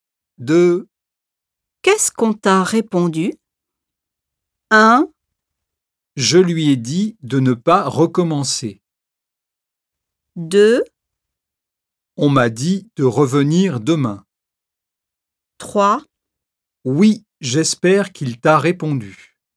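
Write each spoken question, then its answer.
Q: Qu'est-ce qu'on t'a répondu?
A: 2: On m'a dit de revenir demain.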